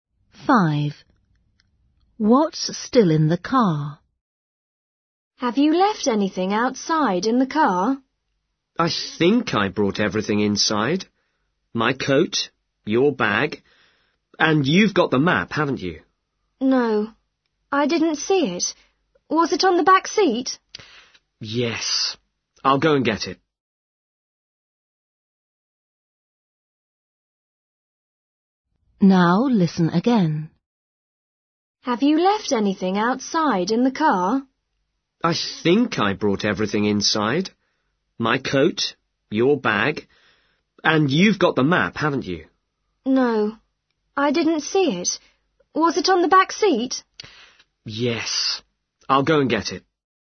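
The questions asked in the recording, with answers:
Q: What's still in the car?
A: the map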